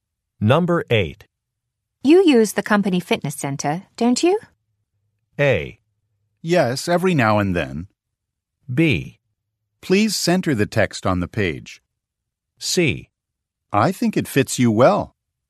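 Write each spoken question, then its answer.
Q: You use the company fitness center, don't you?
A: A: Yes, every now and then.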